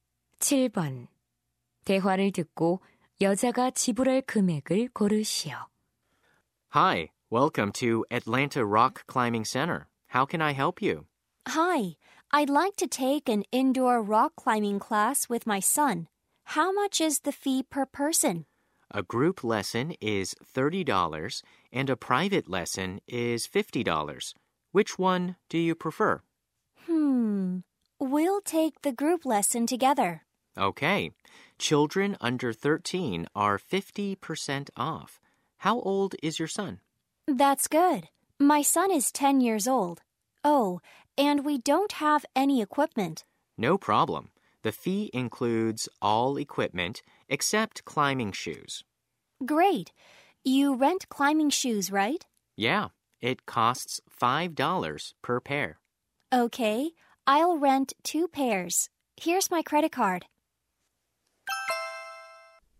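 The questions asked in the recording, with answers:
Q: 대화를 듣고 여자가 지불할 금액을 고르시오.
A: 55달러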